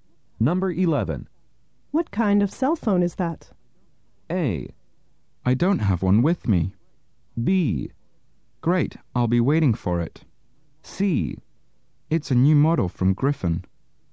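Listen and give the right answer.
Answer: C: It's a new model from Griffin.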